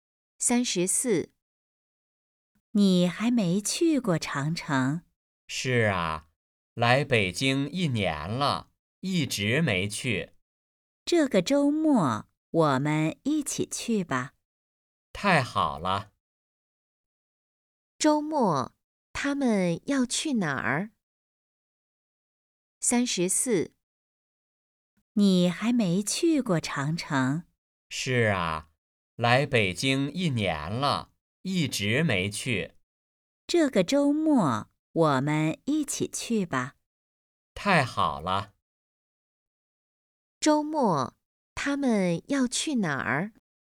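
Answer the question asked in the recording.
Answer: 长城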